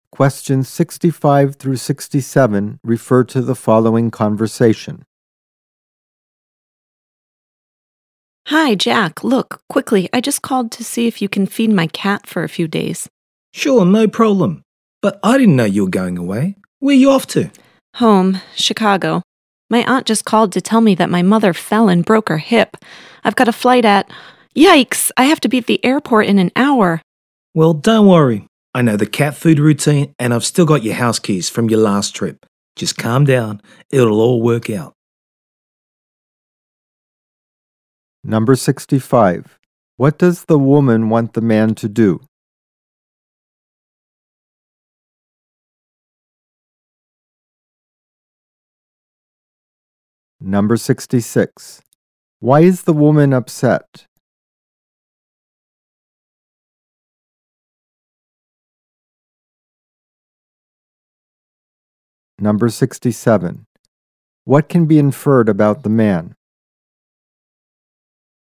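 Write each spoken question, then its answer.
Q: What does the woman want the man to do?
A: Feed her cat

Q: Why is the woman upset?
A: Her mother fell and broke her hip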